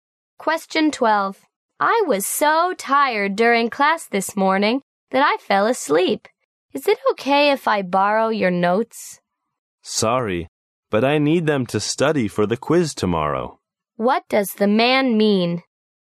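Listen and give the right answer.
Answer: He won't lend his notes because he needs them to study for tomorrow's quiz.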